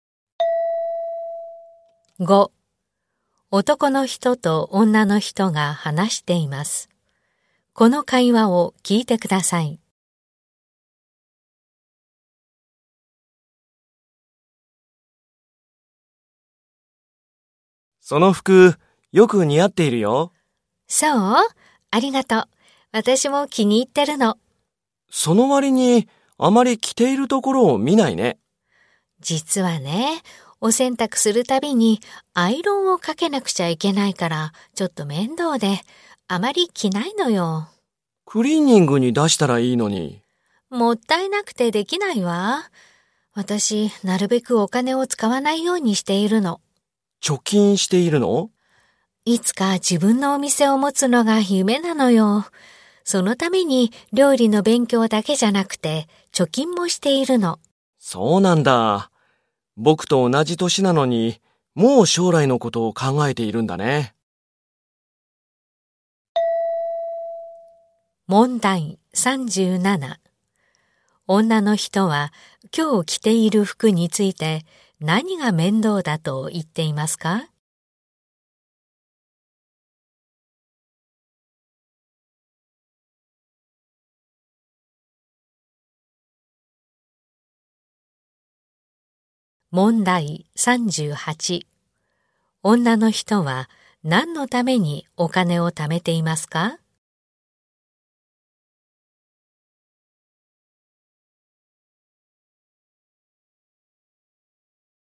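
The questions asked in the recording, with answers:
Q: 女の人は今日着ている服について何が面倒だと言っていますか?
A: 洗濯するたびにアイロンをかけること

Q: 女の人は何のためにお金を貯めていますか?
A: 自分のお店を持つため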